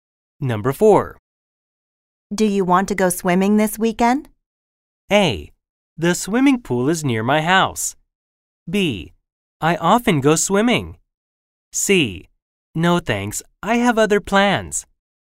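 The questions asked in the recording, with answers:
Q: Do you want to go swimming this weekend?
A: C: No thanks, I have other plans.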